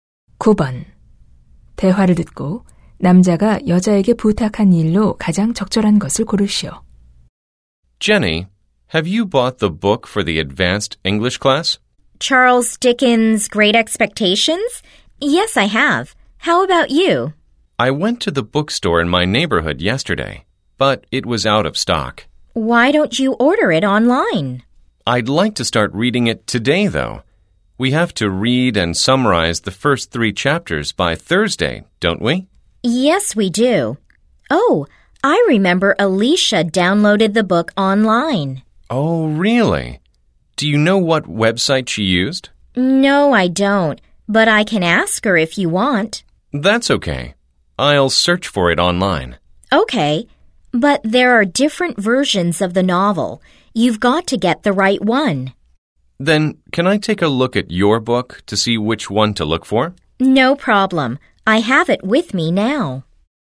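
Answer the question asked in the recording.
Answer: 책을 보여 주기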